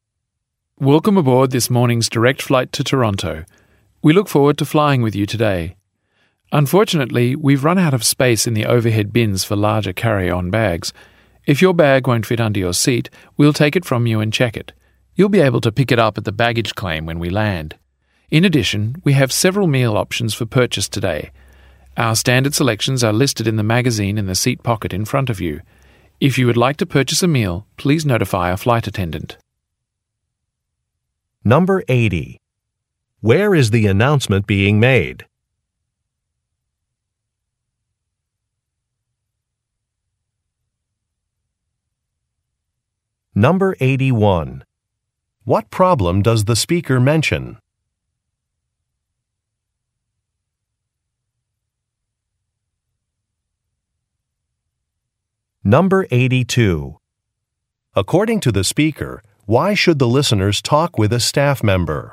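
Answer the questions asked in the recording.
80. On an airplane
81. There is no more space in the overhead bins for larger carry-on bags
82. To buy a meal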